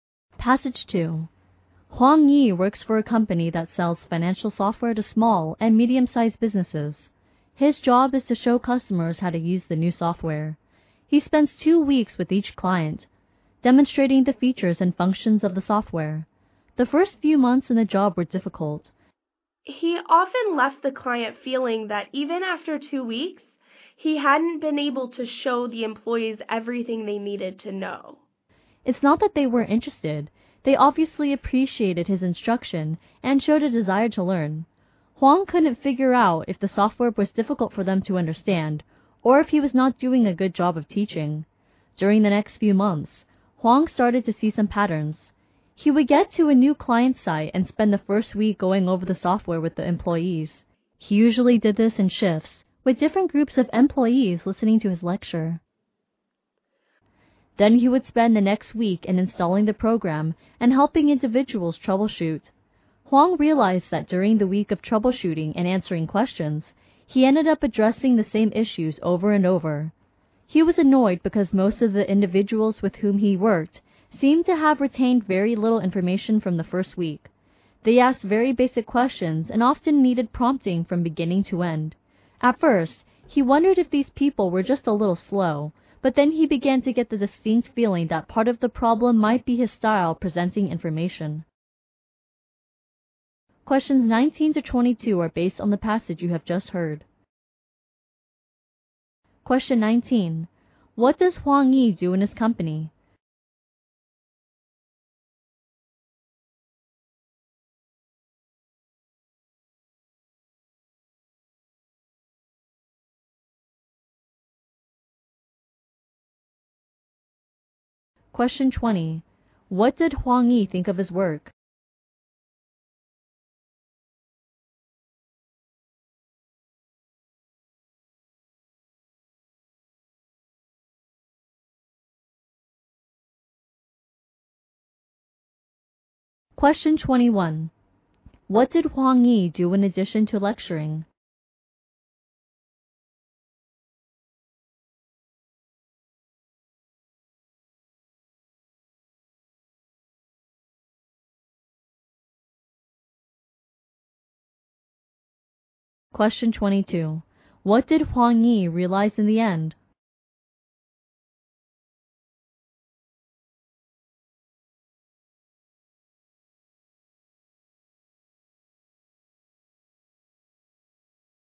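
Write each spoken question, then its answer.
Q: What does Huang Yi do in his company?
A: He shows customers how to use the new financial software.

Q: What did Huang Yi do in addition to lecturing?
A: He installed the program and helped individual users troubleshoot.

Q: What did Huang Yi realize in the end?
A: Part of the problem might be his way of presenting information.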